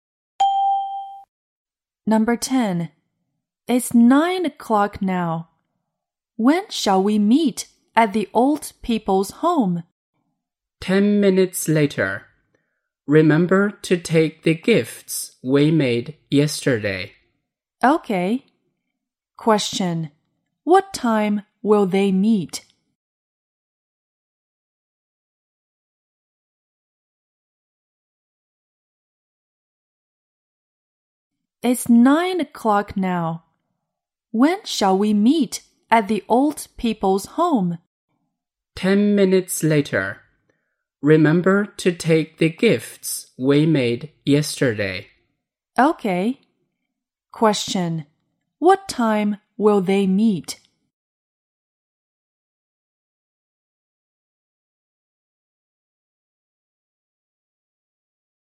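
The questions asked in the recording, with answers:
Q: What time will they meet?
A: At 9:10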